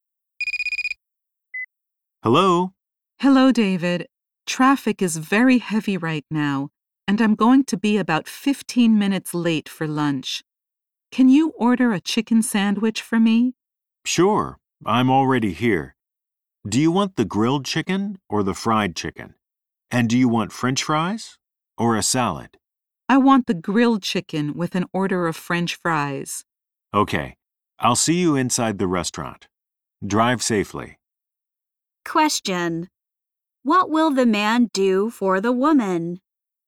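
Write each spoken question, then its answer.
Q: What will the man do for the woman?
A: Order a grilled chicken sandwich with French fries for her.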